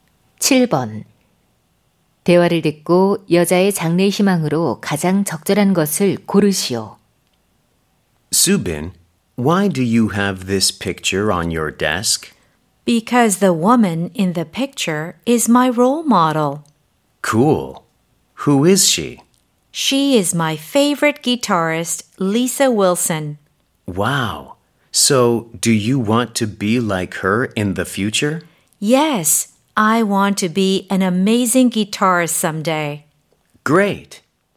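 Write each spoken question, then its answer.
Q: 대화를 듣고 여자의 장래 희망으로 가장 적절한 것을 고르시오.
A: 기타리스트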